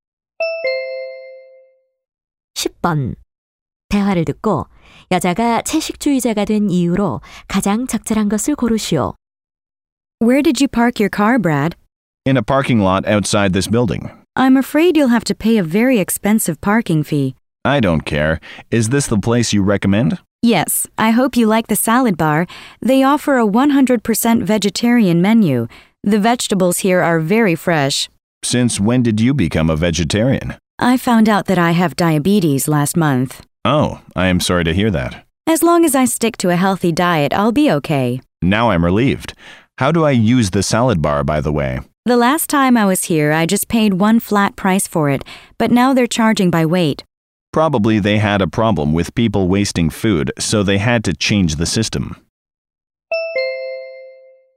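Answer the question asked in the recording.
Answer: 당뇨병이 있다는 것을 알게 되어서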